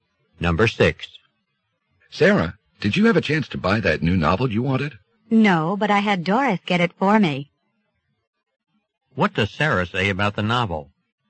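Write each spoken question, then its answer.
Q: What does Sarah say about the novel?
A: Doris bought it for her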